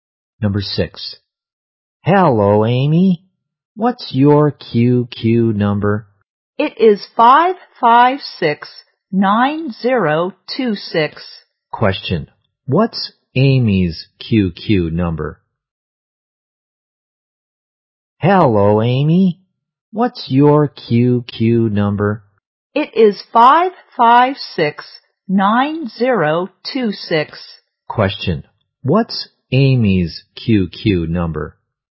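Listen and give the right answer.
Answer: 556-9026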